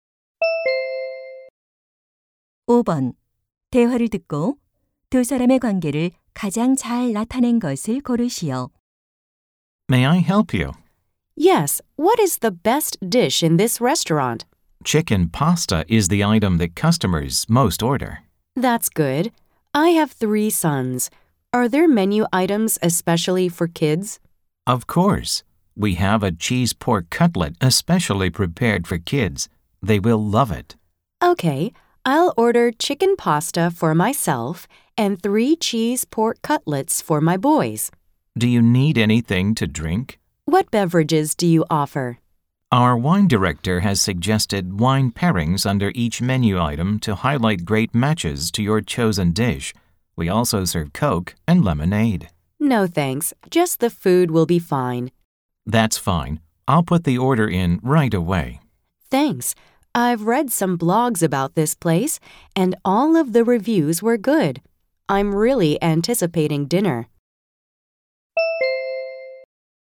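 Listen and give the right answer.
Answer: 식당 종업원 - 손님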